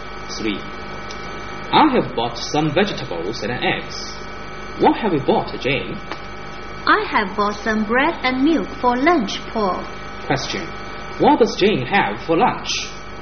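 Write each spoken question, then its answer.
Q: What does Jane have for lunch?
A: Bread and milk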